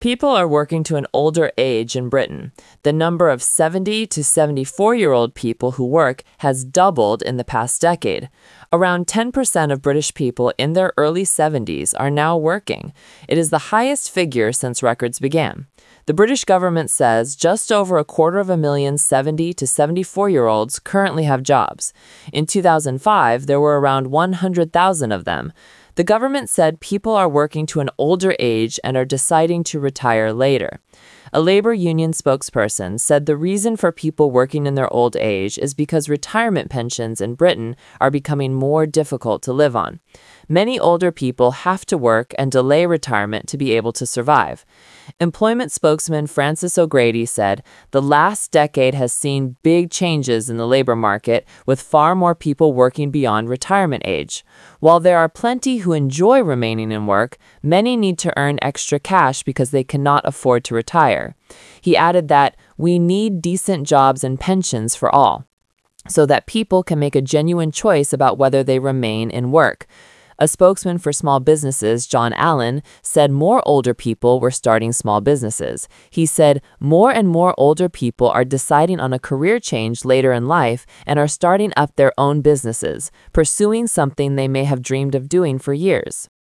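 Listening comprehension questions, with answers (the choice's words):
Talk/Lecture 1: Listen to a talk about 70-year-olds working.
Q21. By how many times has the number of working 70-74 year-olds risen?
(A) five times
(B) four times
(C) three times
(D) two times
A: two times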